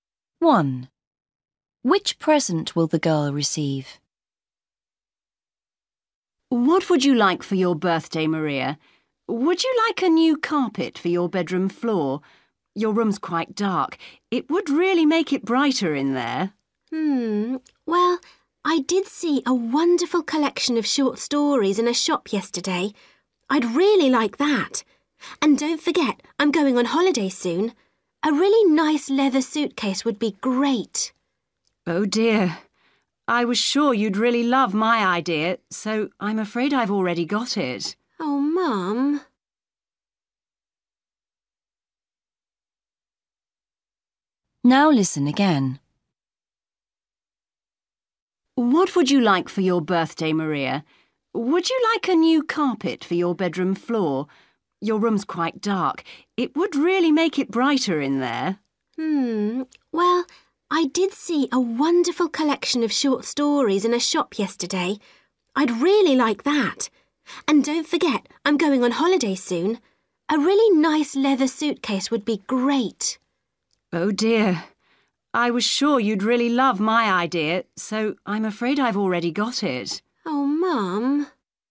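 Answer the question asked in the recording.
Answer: a carpet for her bedroom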